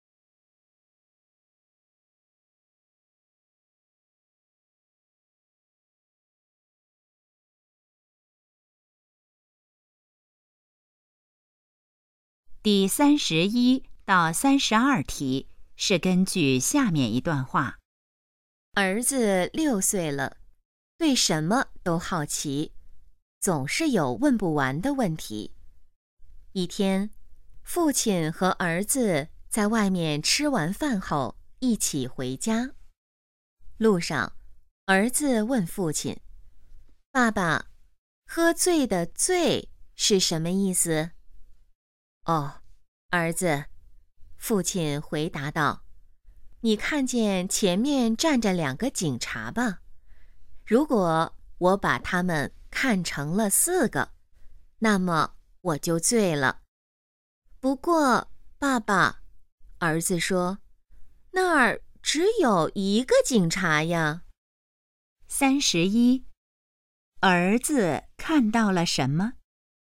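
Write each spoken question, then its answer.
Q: 儿子看到了什么?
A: 一个警察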